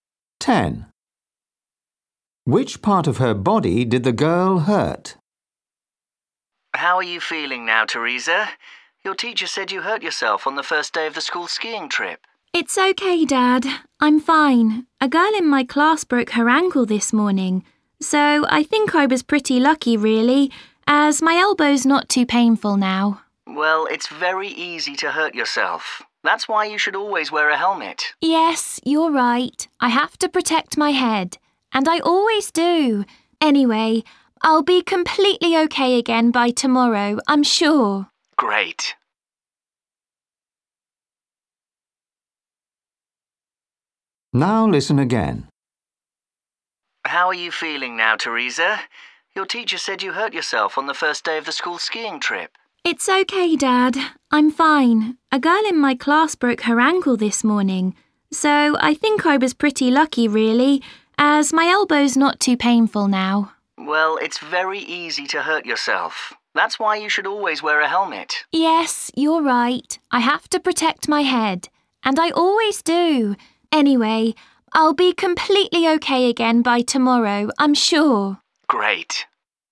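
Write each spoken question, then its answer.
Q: Which part of her body did the girl hurt?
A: her elbow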